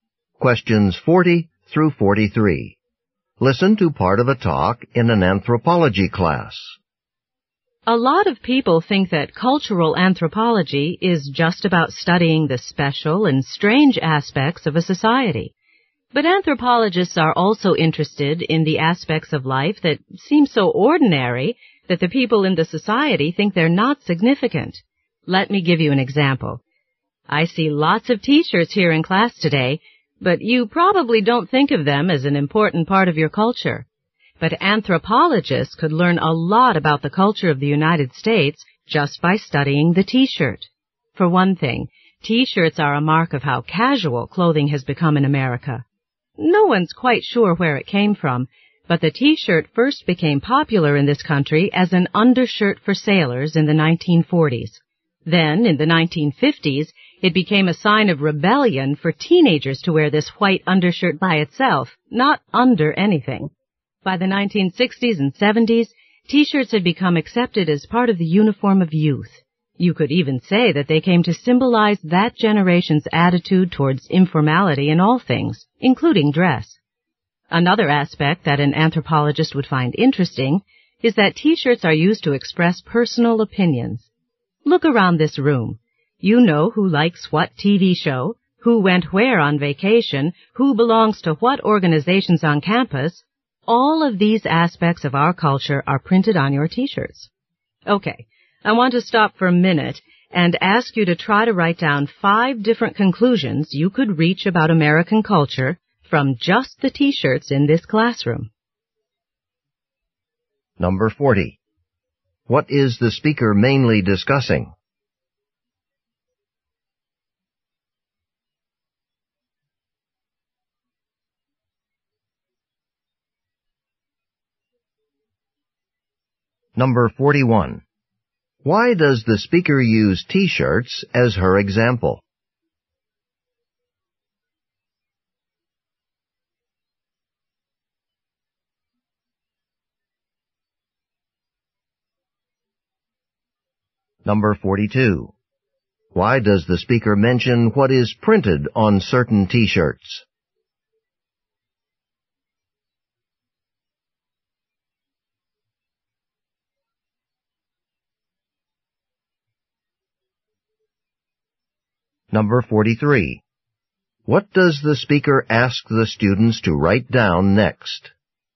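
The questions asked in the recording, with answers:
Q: What is the speaker mainly discussing?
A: What T-shirts reveal about American culture.

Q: Why does the speaker use T-shirts as her example?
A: To show that ordinary things can reveal a lot about a culture.

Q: Why does the speaker mention what is printed on certain T-shirts?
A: To show that T-shirts are used to express personal opinions and interests.

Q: What does the speaker ask the students to write down next?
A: Five conclusions about American culture based on the T-shirts in the classroom.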